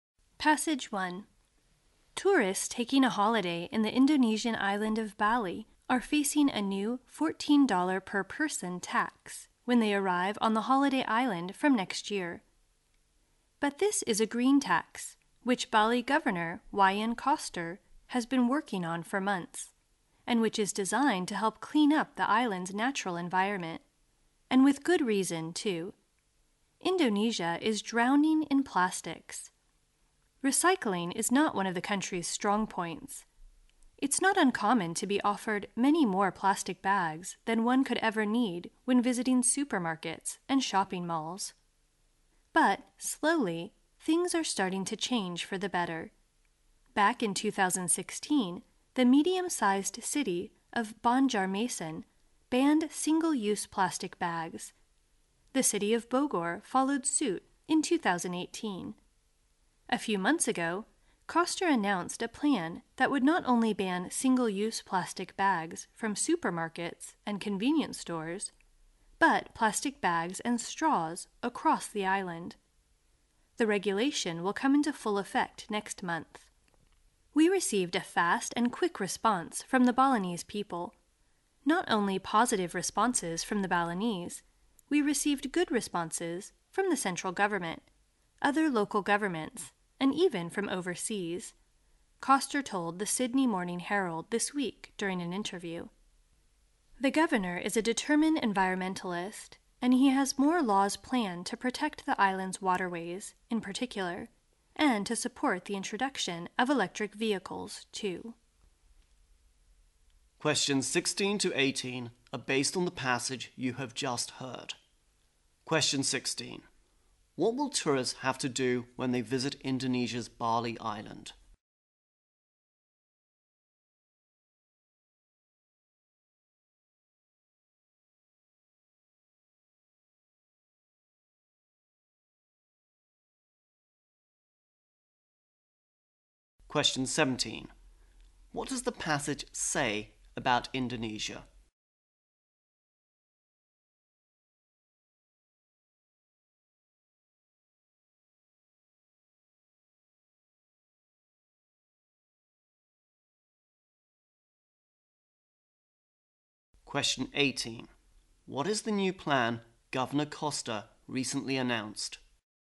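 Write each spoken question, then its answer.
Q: What will tourists have to do when they visit Indonesia's Bali Island?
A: Pay a $14 green tax

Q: What does the passage say about Indonesia?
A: It is drowning in plastics

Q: What is the new plan Governor Koster recently announced?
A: To ban single-use plastic bags and straws across the island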